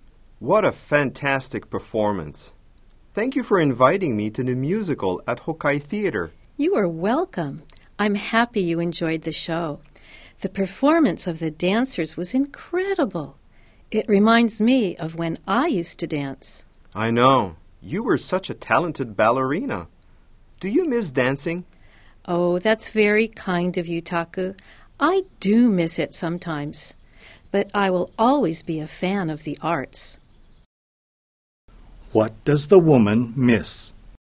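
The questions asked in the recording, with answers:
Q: What does the woman miss?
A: Dancing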